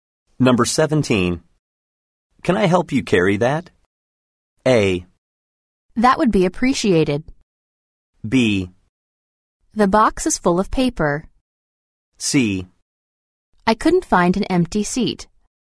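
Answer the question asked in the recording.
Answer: A: That would be appreciated.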